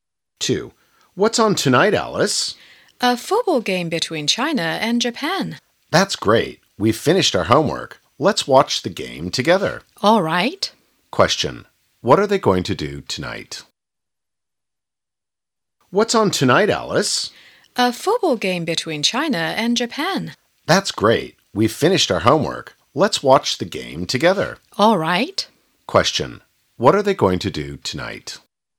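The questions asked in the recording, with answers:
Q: Question. What are they going to do tonight?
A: Watch a football game between China and Japan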